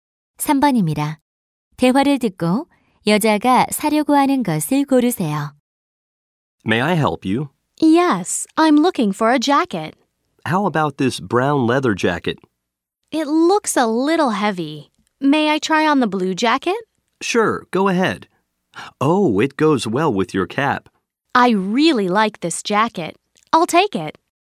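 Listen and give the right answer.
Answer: 파란색 재킷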